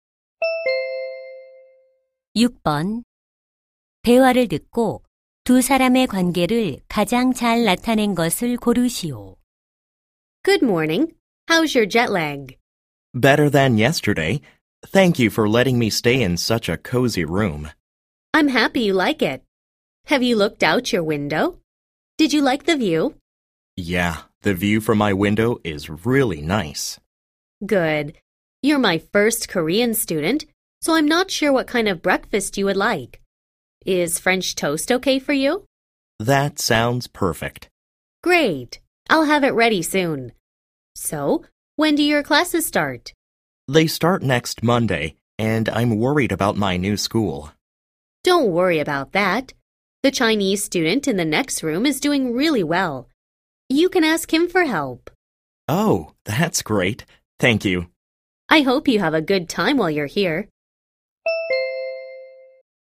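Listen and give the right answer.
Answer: 홈스테이 호스트 - 유학생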